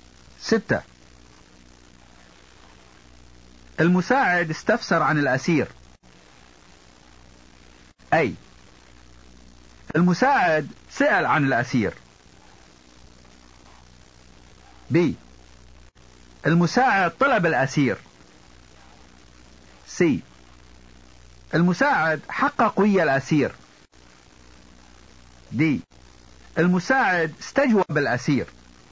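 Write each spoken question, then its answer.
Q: المساعد استفسر عن الأسير.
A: A: المساعد سأل عن الأسير.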